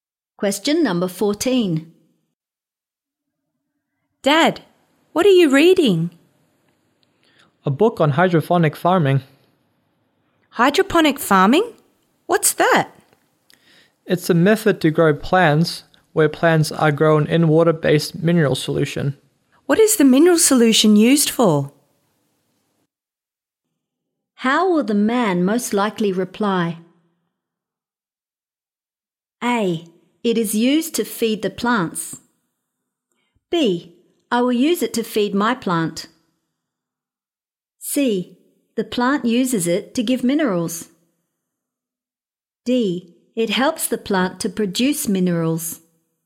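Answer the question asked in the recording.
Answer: A: It is used to feed the plants.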